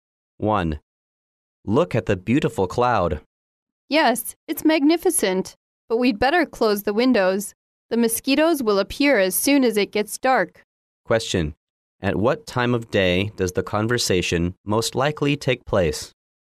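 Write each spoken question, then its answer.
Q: At what time of day does the conversation most likely take place?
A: In the evening, before dark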